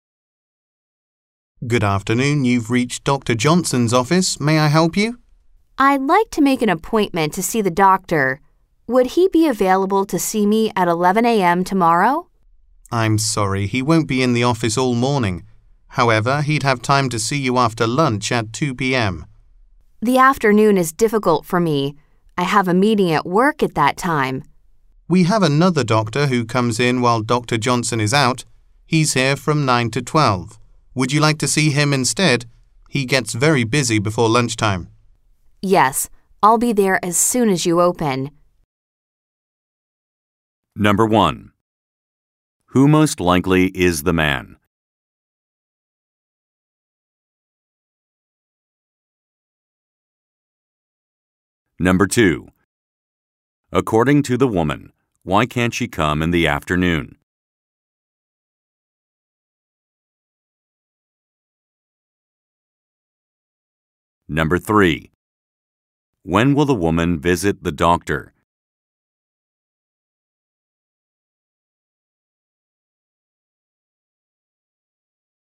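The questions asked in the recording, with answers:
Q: Who most likely is the man?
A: A receptionist at Dr. Johnson's office

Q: According to the woman, why can't she come in the afternoon?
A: She has a meeting at work

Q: When will the woman visit the doctor?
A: Tomorrow morning at 9 a.m., when the office opens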